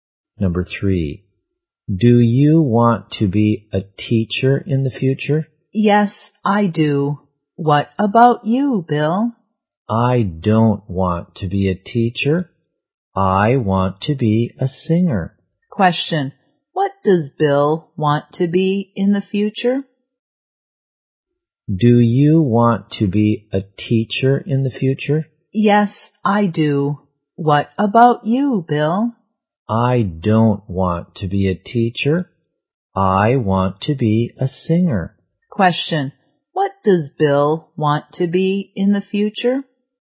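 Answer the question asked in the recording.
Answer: A singer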